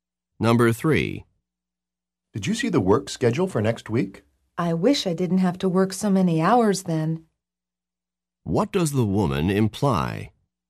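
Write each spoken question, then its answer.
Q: What does the woman imply?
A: She has to work many hours next week.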